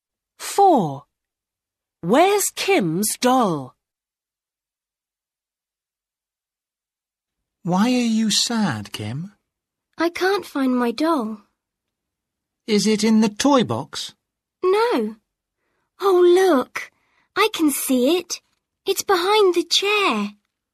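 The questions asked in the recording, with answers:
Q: Where's Kim's doll?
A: Behind the chair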